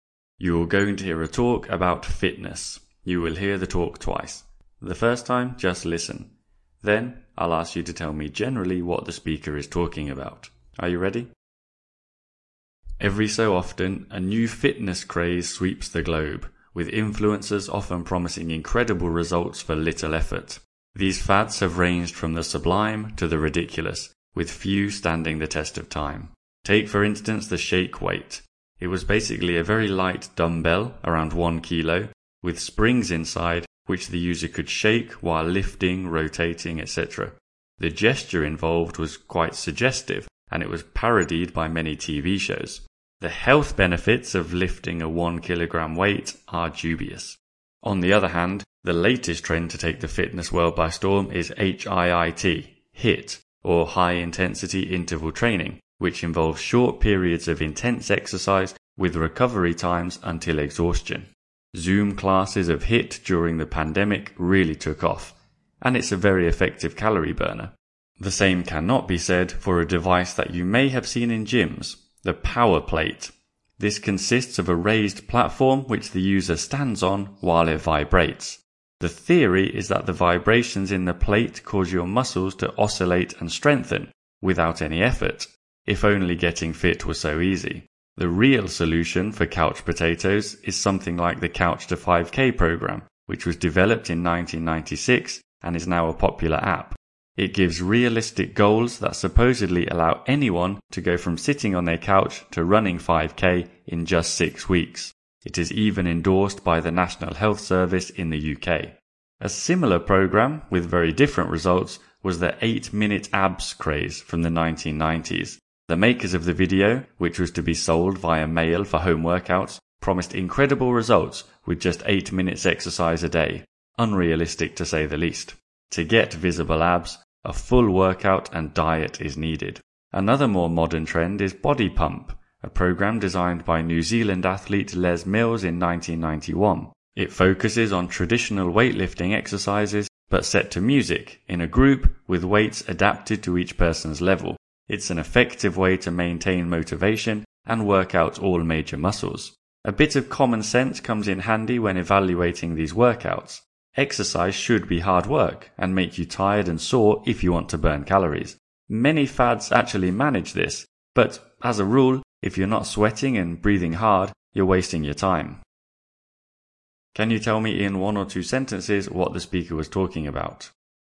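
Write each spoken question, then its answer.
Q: Can you tell me in one or two sentences what the speaker was talking about?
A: Fitness fads/crazes over the years and whether they actually work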